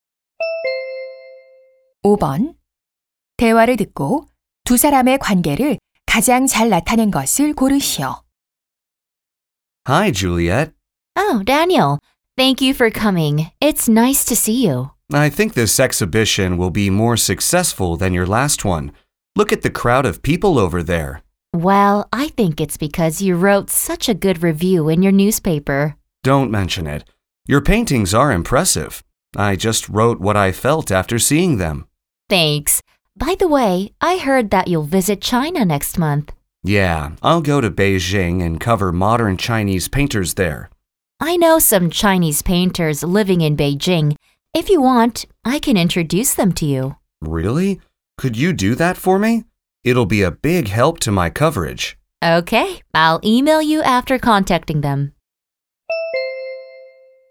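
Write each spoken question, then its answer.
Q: 대화를 듣고 두 사람의 관계를 가장 잘 나타낸 것을 고르시오.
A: 화가 - 신문 기자(미술 평론가)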